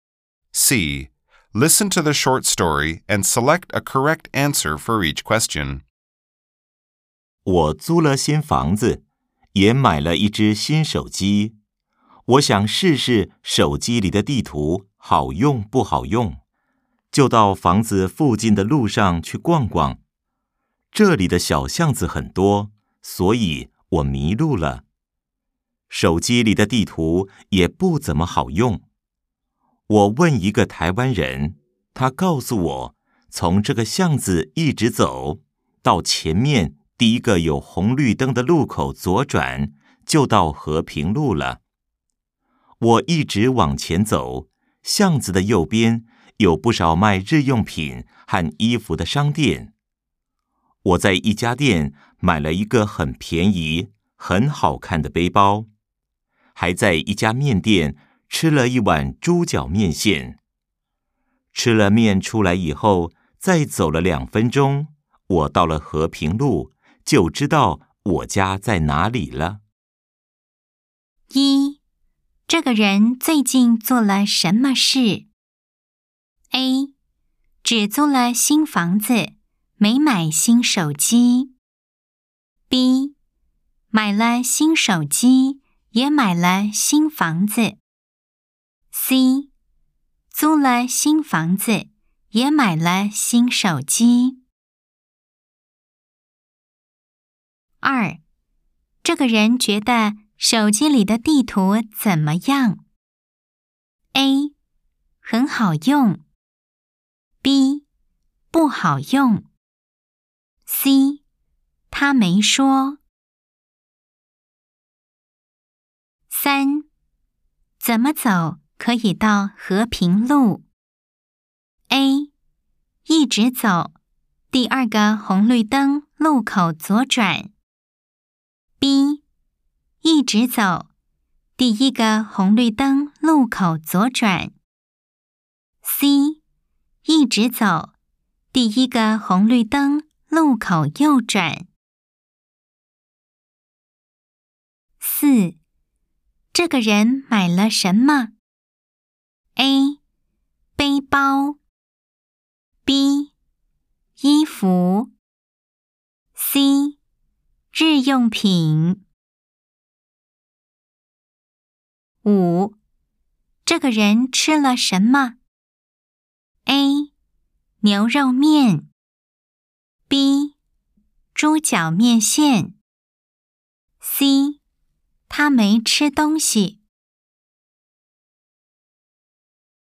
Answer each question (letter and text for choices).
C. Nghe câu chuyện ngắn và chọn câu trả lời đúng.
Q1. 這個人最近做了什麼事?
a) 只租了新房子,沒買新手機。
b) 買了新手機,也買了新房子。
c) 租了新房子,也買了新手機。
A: c) 租了新房子,也買了新手機。

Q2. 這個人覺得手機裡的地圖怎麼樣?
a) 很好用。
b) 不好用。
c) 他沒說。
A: b) 不好用。

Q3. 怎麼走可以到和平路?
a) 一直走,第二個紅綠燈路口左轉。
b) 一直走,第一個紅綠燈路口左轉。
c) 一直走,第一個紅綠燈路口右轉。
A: b) 一直走,第一個紅綠燈路口左轉。

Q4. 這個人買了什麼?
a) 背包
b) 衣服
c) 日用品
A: a) 背包

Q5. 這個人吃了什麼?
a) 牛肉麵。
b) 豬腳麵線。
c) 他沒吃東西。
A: b) 豬腳麵線。